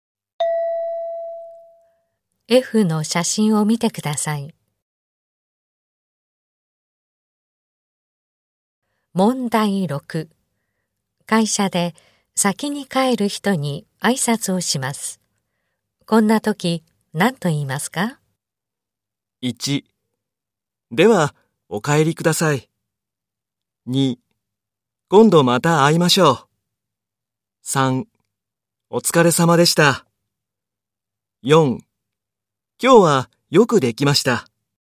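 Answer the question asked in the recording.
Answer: 3: お疲れ様でした。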